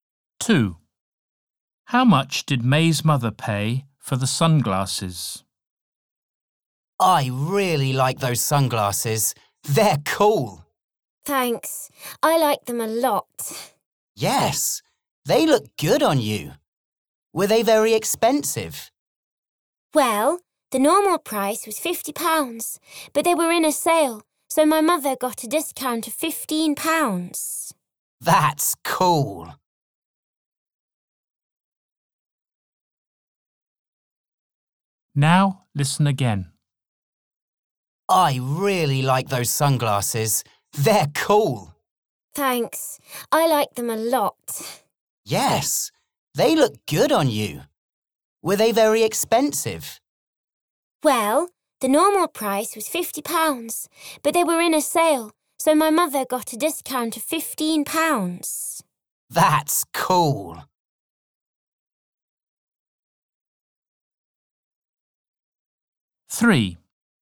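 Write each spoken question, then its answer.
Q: How much did May's mother pay for the sunglasses?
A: £35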